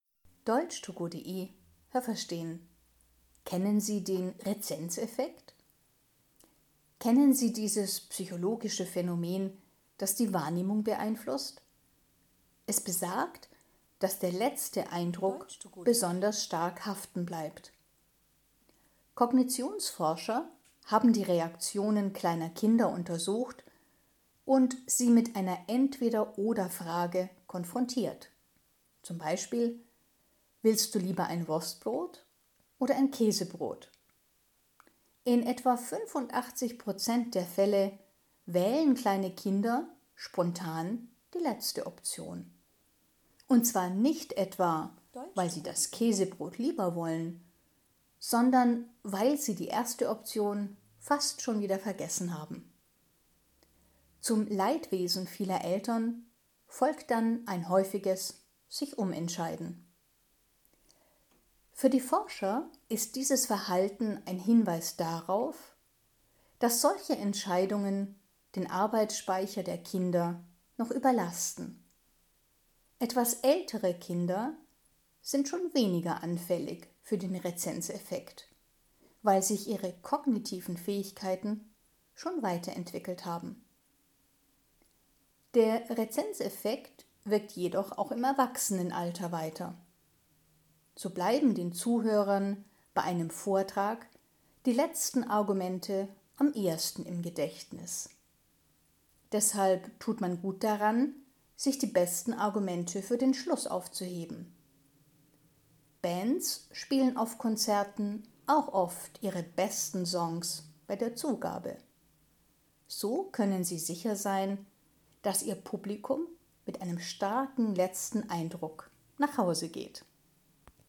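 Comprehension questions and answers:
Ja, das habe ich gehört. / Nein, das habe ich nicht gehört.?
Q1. Der Rezenzeffekt bedeutet, dass der letzte Eindruck besonders gut im Gedächtnis bleibt.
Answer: Ja, das habe ich gehört.

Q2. Bei einer Entweder-oder-Frage können sich kleine Kinder in 85 Prozent der Fälle nicht entscheiden.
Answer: Nein, das habe ich nicht gehört.

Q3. Weil kleine Kinder bei einer Entweder-oder-Frage oft die erste Option vergessen, ändern sie später häufig ihre Meinung.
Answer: Ja, das habe ich gehört.

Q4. Entweder-oder-Fragen überfordern kleine Kinder.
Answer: Ja, das habe ich gehört.

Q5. Der Rezenzeffekt spielt bei größeren Kindern und bei Erwachsenen keine Rolle mehr.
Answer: Nein, das habe ich nicht gehört.

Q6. Bei einer Reihe von Argumenten wirken die letzten Argumente am intensivsten.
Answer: Ja, das habe ich gehört.

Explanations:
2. 85 % der kleinen Kinder wählen die letzte Option.
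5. Größere Kinder sind zwar nicht mehr so anfällig wie kleinere Kinder, aber sogar bei Erwachsenen wirkt der Rezenzeffekt weiter.

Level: C1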